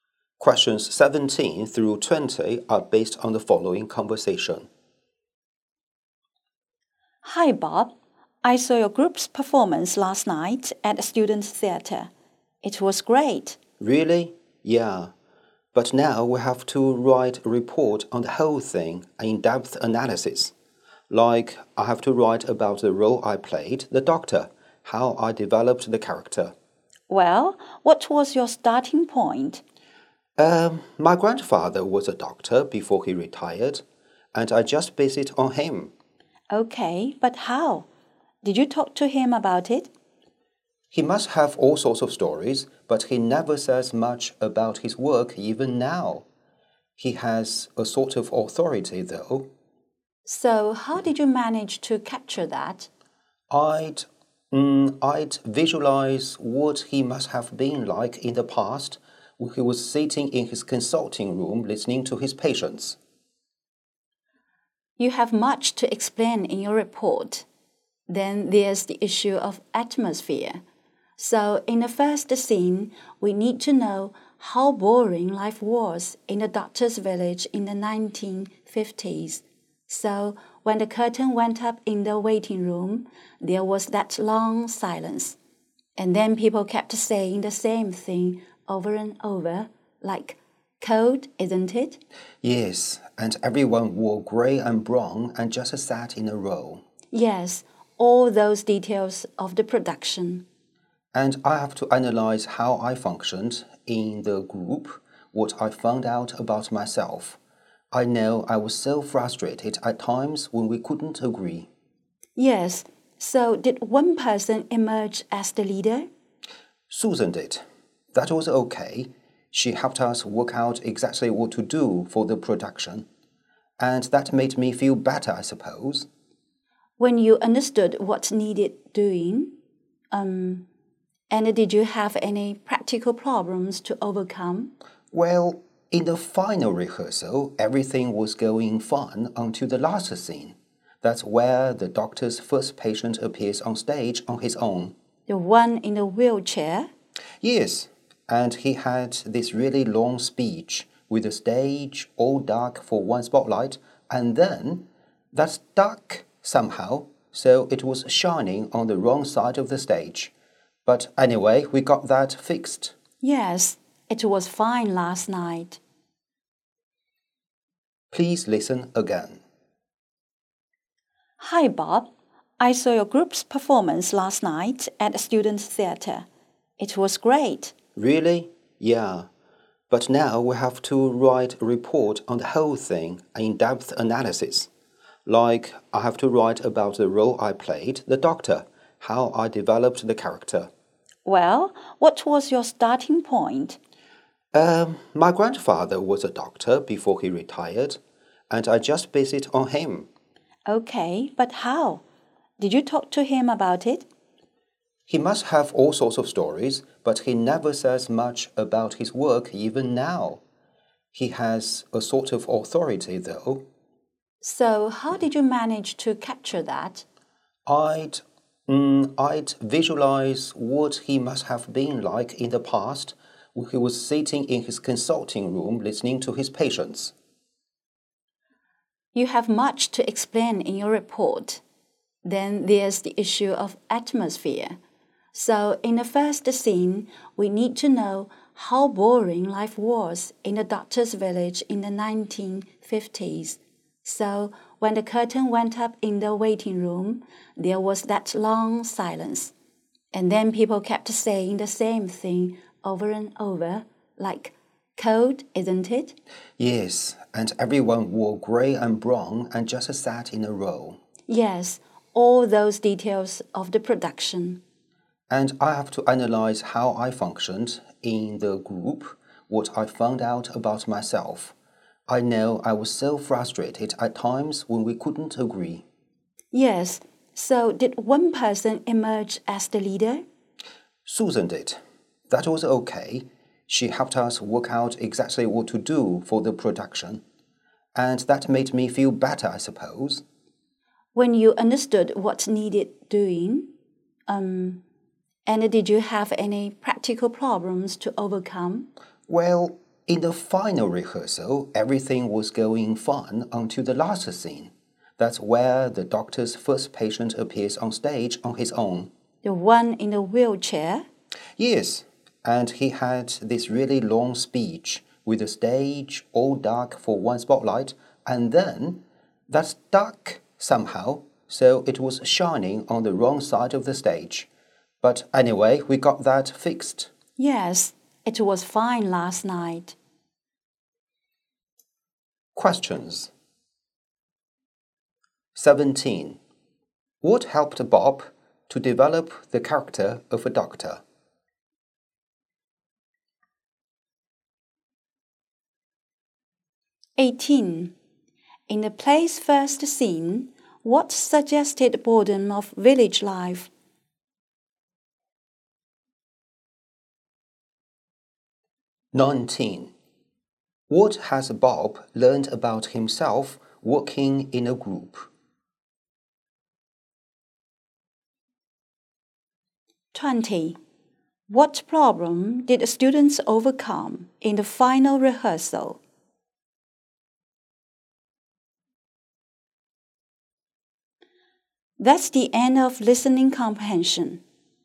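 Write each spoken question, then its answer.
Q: What helped Bob to develop the character of a doctor?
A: Imagining his grandfather, a retired doctor, in his consulting room

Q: In the play's first scene, what suggested boredom of village life?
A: A long silence, people repeating the same things, grey and brown clothes, sitting in a row

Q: What problem did the students overcome in the final rehearsal?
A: The spotlight was shining on the wrong side of the stage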